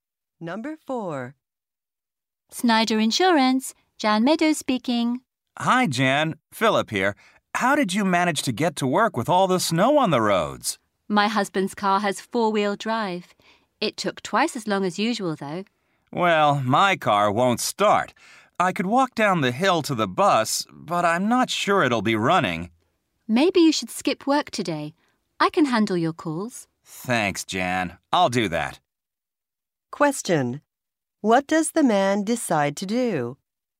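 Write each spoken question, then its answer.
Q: What does the man decide to do?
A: Skip work today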